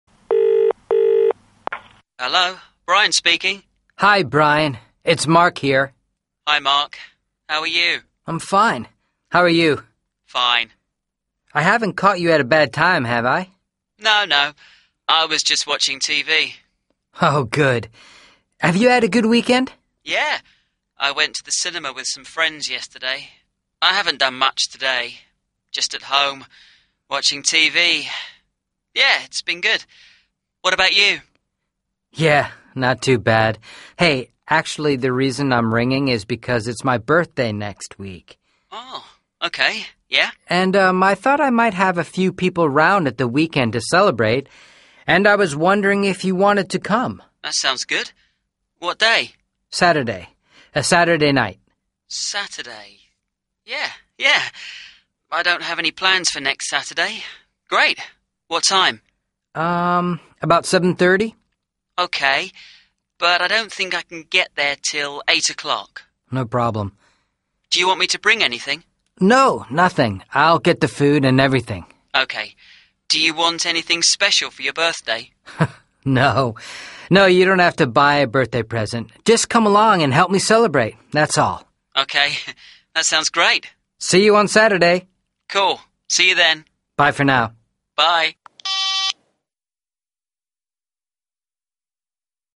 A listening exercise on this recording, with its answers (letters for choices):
Mark telephones his friend Brian on Sunday night. Listen to their conversation. What is the main reason for the phone call? Choose a, b or c.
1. What is the main reason for the phone call?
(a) to find out what Brian did at the weekend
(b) to find out what Brian is doing next weekend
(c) to invite Brian to a birthday party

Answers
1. c

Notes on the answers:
They talk about what Brian did last weekend but most of the conversation is about Mark's birthday party.